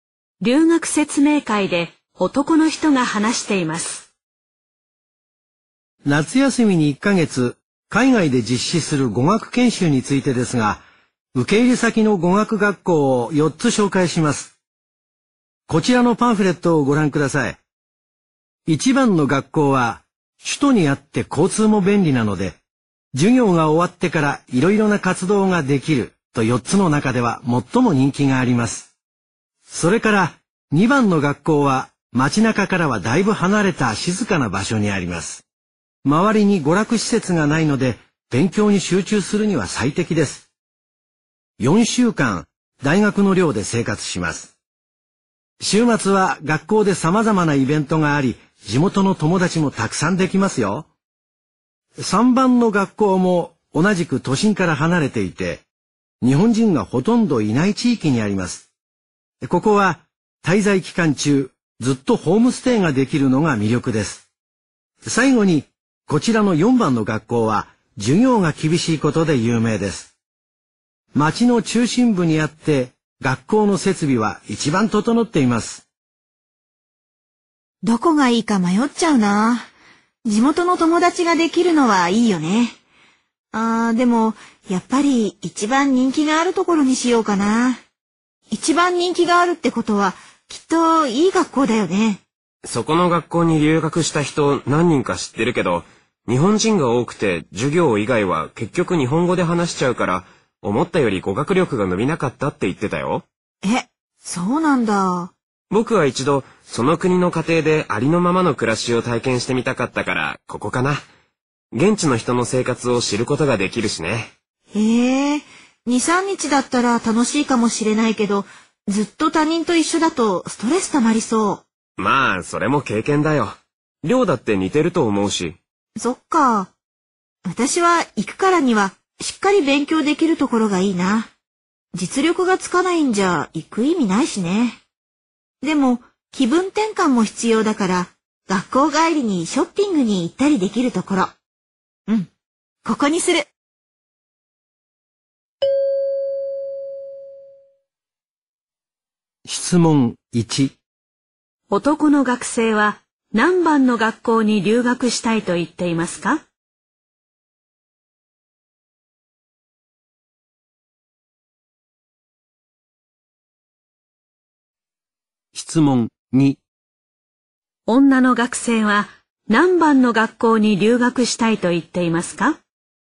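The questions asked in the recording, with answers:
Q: 男の学生は何番の学校に留学したいと言っていますか?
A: 3番の学校

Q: 女の学生は何番の学校に留学したいと言っていますか?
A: 4番の学校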